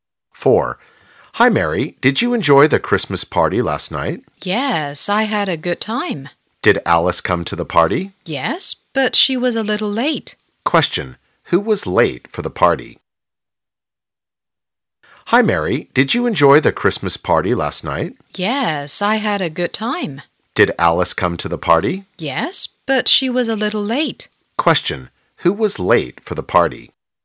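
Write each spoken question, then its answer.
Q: Who was late for the party?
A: Alice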